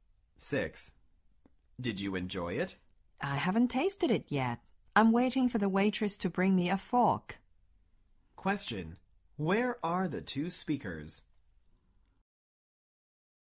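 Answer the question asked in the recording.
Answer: In a restaurant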